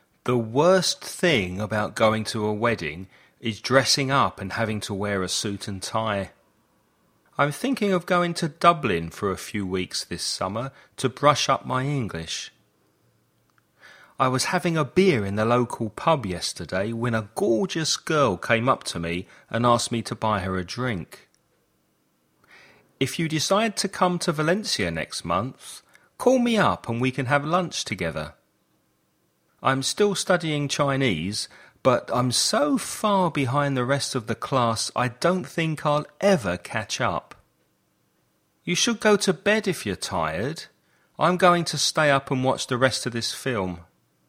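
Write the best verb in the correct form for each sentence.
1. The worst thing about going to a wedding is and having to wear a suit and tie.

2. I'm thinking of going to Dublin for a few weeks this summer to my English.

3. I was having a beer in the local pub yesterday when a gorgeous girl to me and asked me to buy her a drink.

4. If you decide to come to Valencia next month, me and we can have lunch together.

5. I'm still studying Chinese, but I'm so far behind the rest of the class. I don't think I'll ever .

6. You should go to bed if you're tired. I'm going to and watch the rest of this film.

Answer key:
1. dressing up
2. brush up
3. came up
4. call me up
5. catch up
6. stay up

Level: Intermedio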